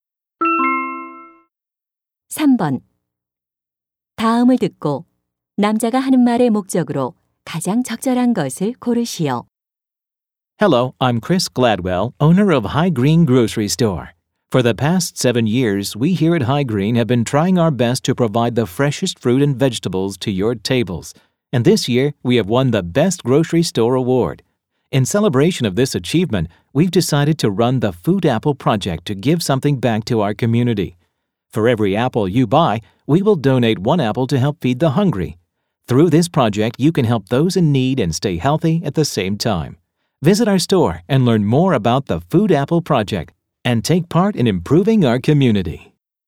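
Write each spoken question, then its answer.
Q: 다음을 듣고 남자가 하는 말의 목적으로 가장 적절한 것을 고르시오.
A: Food Apple Project를 홍보하고 참여를 권하려고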